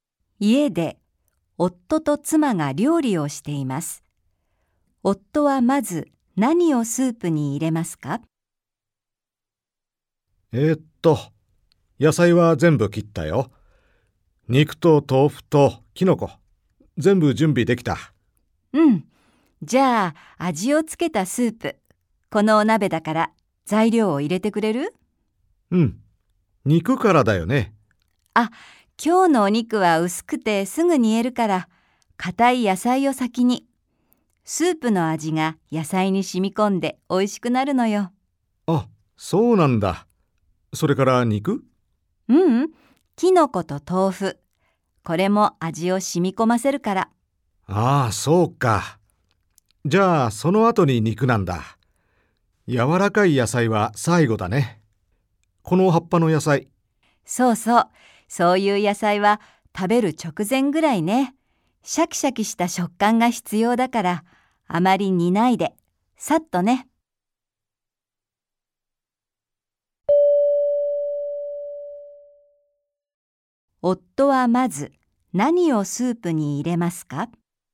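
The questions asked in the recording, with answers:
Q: 夫はまず何をスープに入れますか?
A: 硬い野菜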